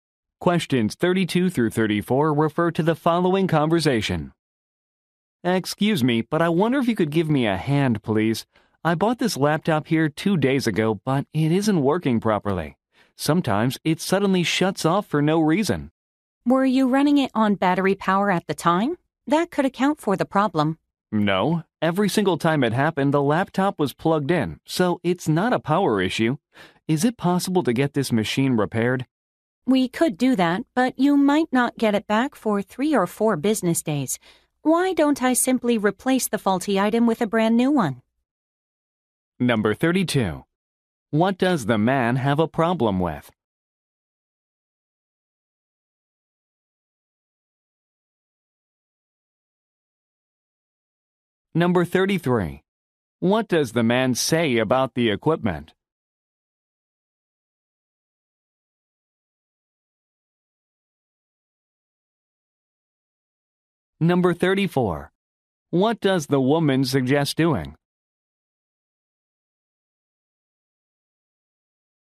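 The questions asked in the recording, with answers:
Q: What does the man have a problem with?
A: A laptop he bought 2 days ago

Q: What does the man say about the equipment?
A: It shuts off even when plugged in

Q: What does the woman suggest doing?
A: Replacing the laptop with a new one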